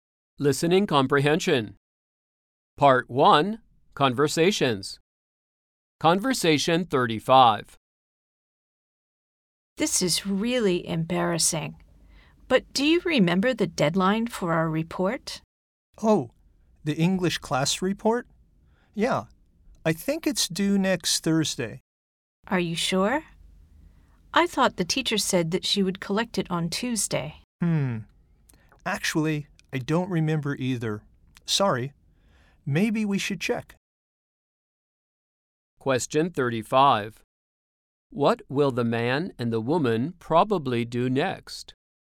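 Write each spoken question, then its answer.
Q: What will the man and the woman probably do next?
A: Check the deadline for the report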